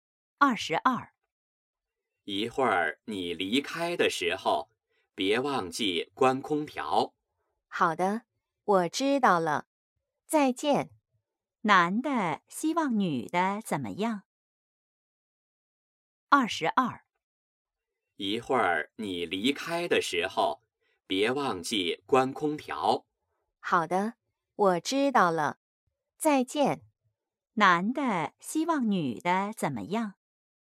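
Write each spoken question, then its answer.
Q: 男的希望女的怎么样?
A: 离开时关空调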